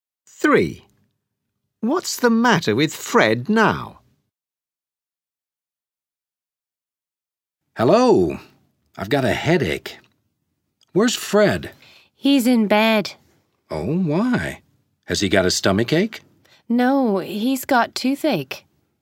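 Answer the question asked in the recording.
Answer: he's got toothache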